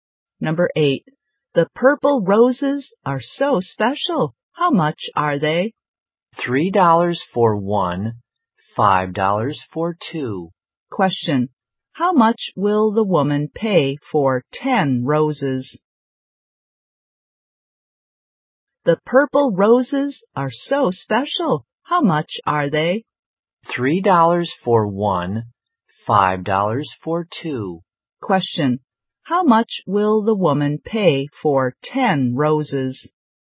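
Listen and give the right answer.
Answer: $25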